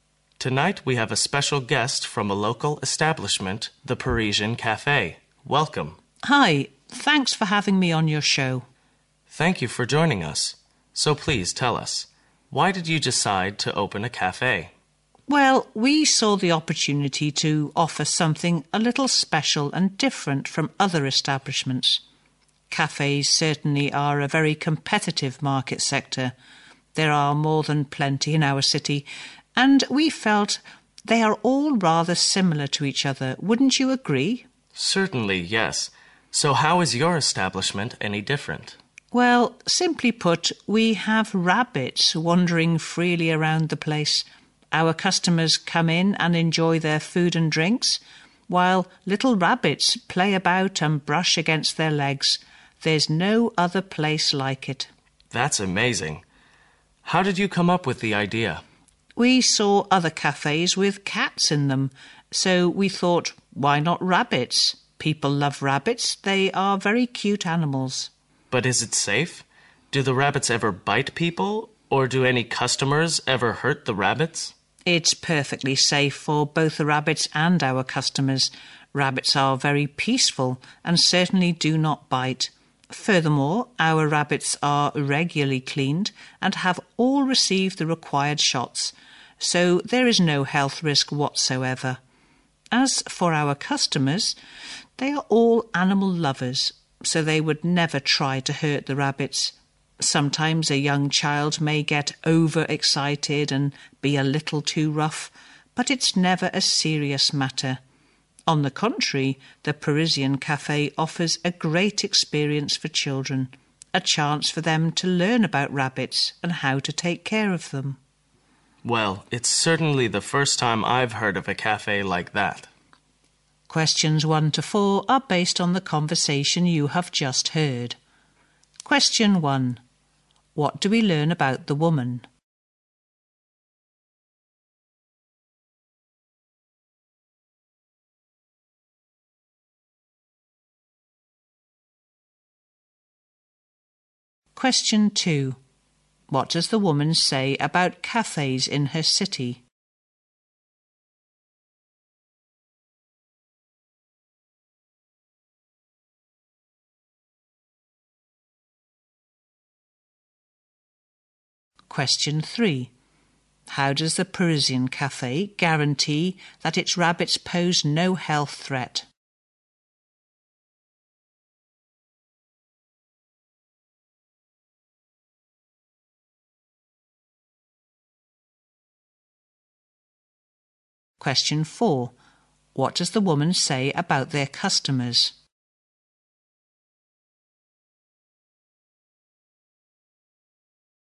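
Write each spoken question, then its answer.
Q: What do we learn about the woman?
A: She opened and runs the Parisian Cafe, a local cafe.

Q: What does the woman say about cafes in her city?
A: There are plenty of them and they are all rather similar to each other.

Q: How does the Parisian Cafe guarantee that its rabbits pose no health threat?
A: The rabbits are regularly cleaned and have received all the required shots.

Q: What does the woman say about their customers?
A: They are all animal lovers who would never try to hurt the rabbits.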